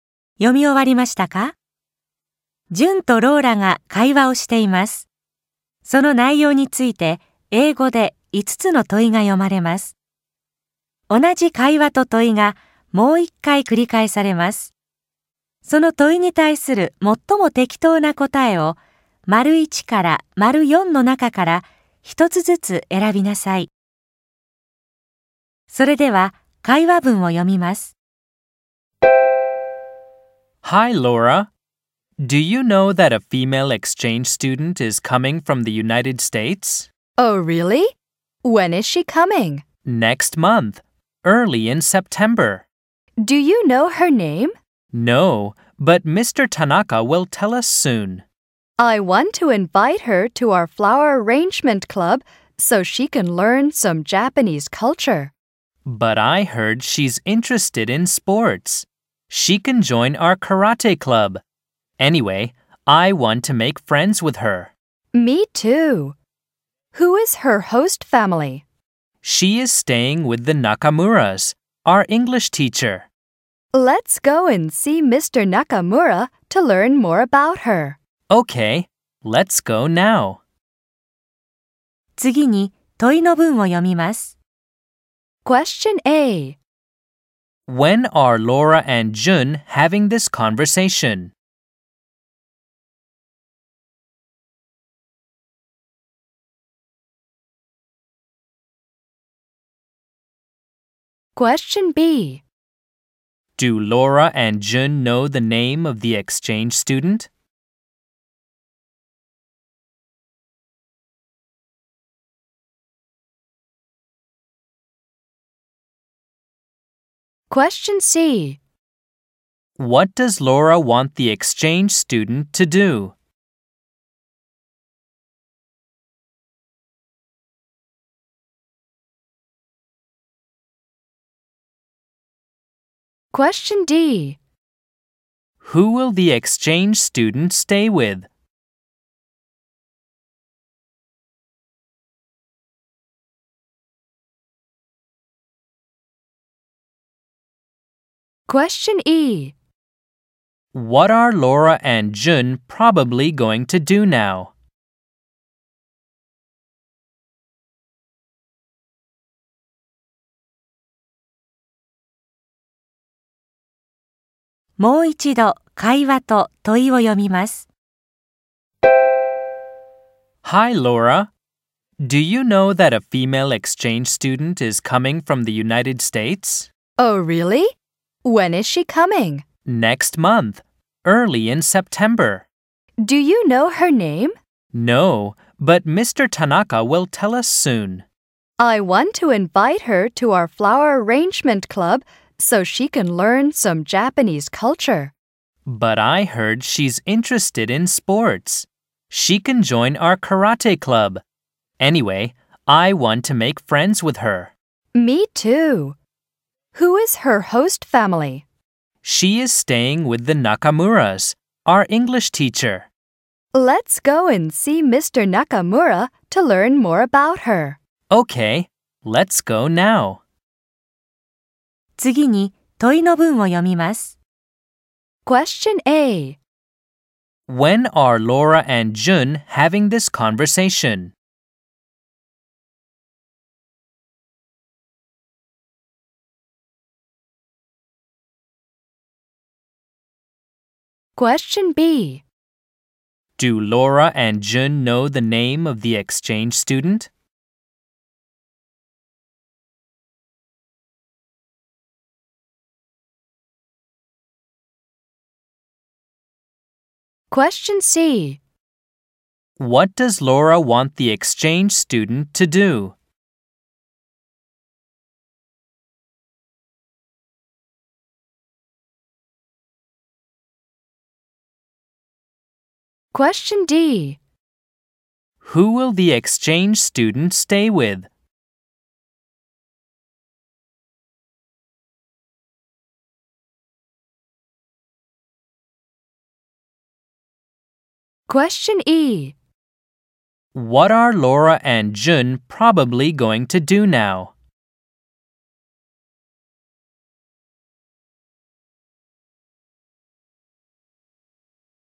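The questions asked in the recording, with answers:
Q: When are Laura and Jun having this conversation?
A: In August.

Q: Do Laura and Jun know the name of the exchange student?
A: No, they don't.

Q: Who will the exchange student stay with?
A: The Nakamuras (the family of their English teacher).

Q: What are Laura and Jun probably going to do now?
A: Go and see Mr. Nakamura.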